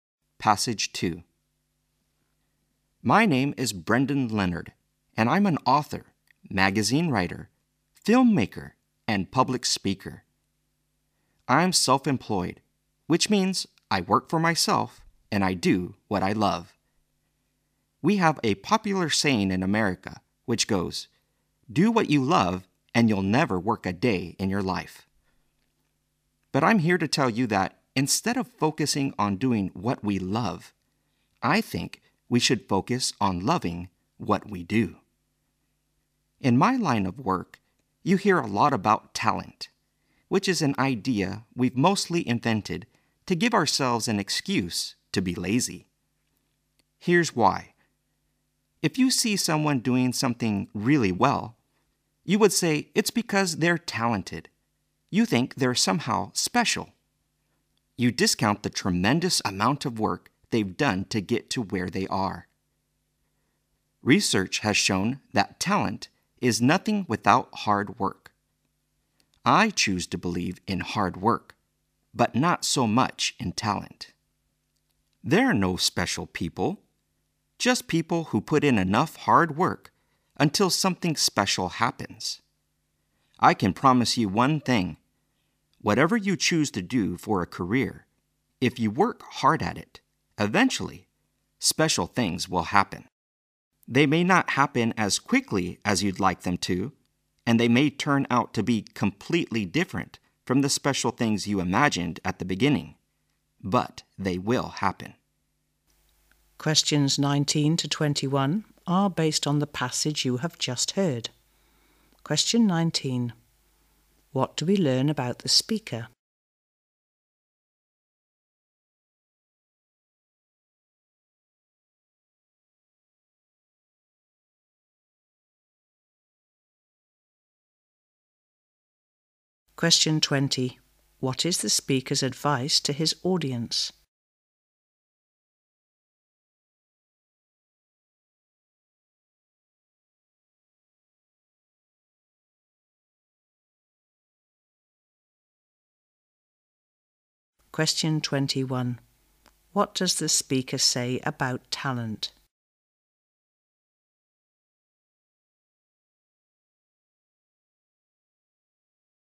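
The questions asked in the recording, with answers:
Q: What is the speaker's advice to his audience?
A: Love what you do

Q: What does the speaker say about talent?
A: It is nothing without hard work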